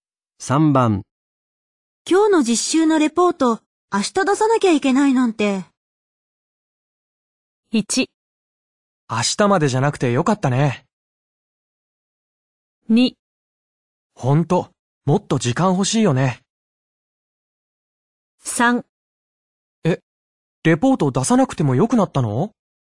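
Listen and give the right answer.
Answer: 2: ほんと、もっと時間欲しいよね。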